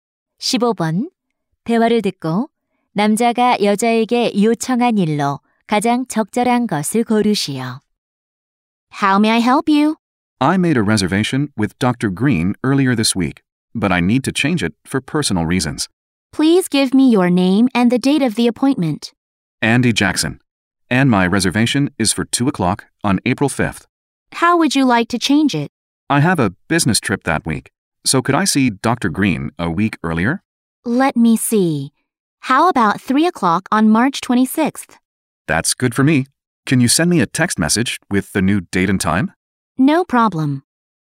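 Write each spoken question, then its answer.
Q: 대화를 듣고 남자가 여자에게 요청한 일로 가장 적절한 것을 고르시오.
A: 새 예약 날짜와 시간을 문자로 보내 주기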